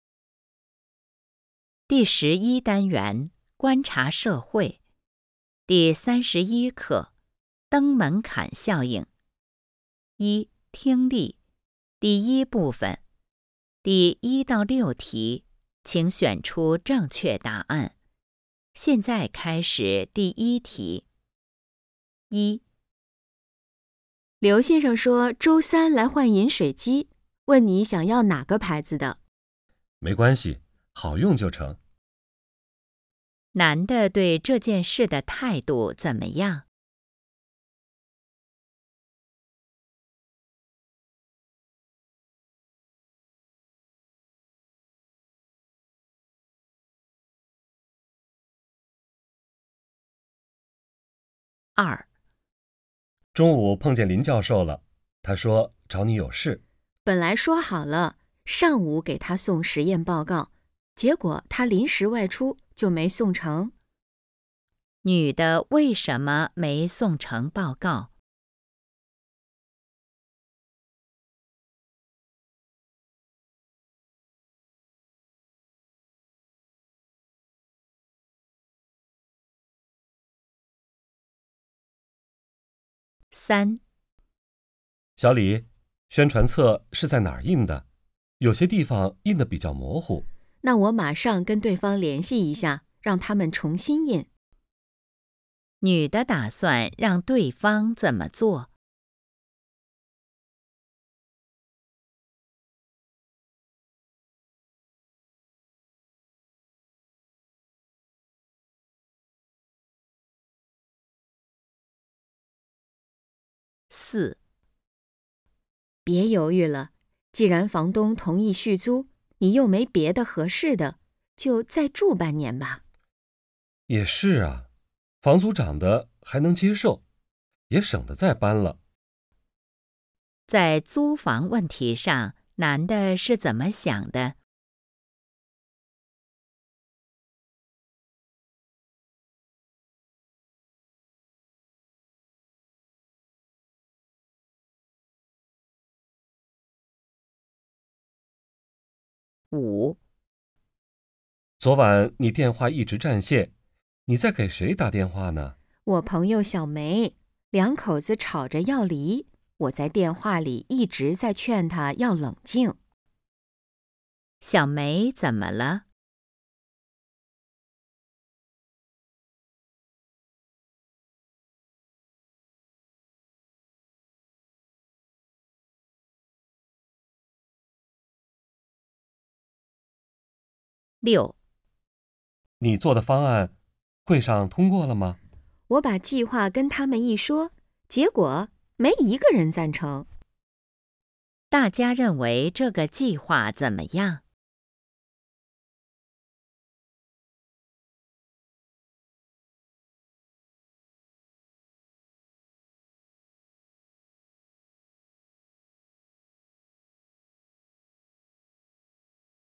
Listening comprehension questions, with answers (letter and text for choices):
第1-6题:请选择正确答案。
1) 男的对这件事的态度怎么样?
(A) 很关心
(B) 无所谓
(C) 坚决反对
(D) 有点儿犹豫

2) 女的为什么没送成报告?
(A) 林教授不在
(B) 她临时有事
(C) 报告还没写完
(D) 说好了改天送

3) 女的打算让对方怎么做?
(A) 修打印机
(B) 退还押金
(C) 重新印刷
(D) 开张发票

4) 在租房问题上, 男的是怎么想的?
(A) 觉得房租贵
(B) 不想再搬家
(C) 房东人挺好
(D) 另找合适的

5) 小梅怎么了?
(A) 想辞职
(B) 失恋了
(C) 受伤了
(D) 要离婚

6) 大家认为这个计划怎么样?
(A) 行不通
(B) 令人满意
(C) 有待完善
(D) 非常完美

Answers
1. (B) 无所谓
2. (A) 林教授不在
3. (C) 重新印刷
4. (B) 不想再搬家
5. (D) 要离婚
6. (A) 行不通

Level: HSK 5